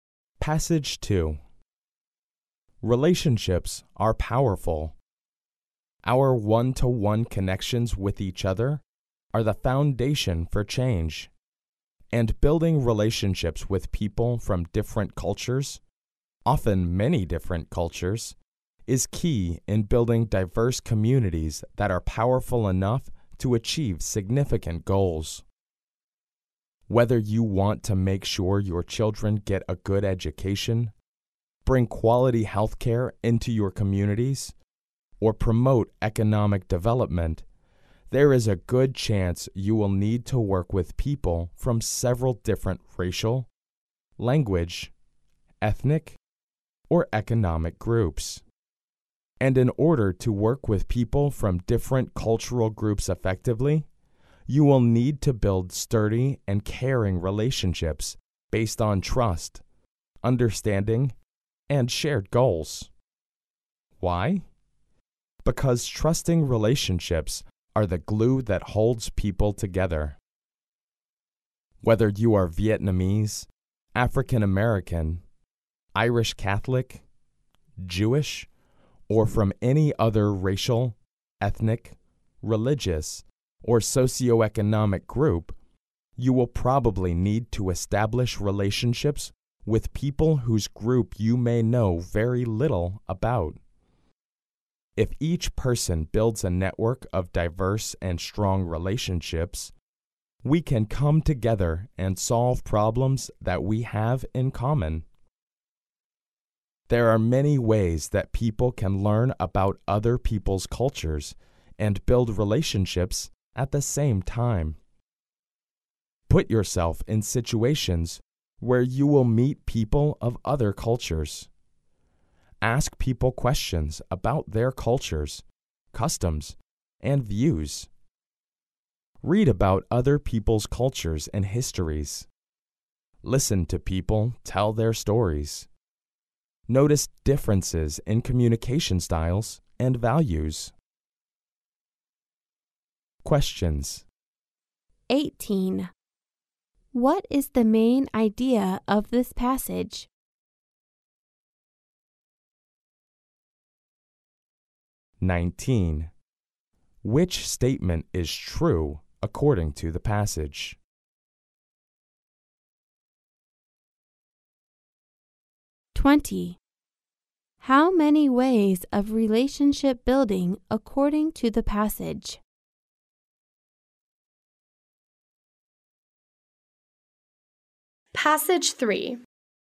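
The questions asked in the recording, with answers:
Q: How many ways of relationship building according to the passage?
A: Five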